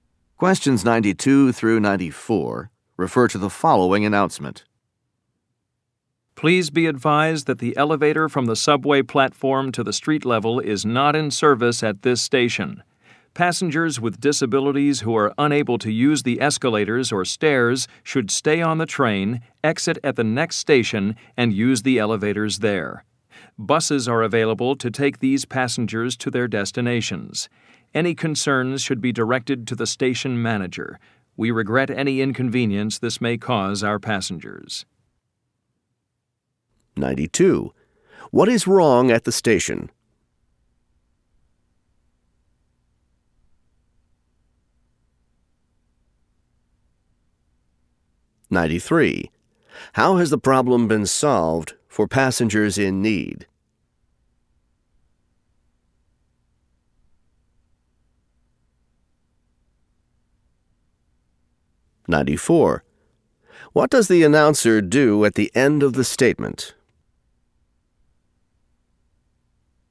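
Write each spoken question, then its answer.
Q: What is wrong at the station?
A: The elevator is not in service

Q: How has the problem been solved for passengers in need?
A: They use the next station's elevators and buses

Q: What does the announcer do at the end of the statement?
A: Apologizes for the inconvenience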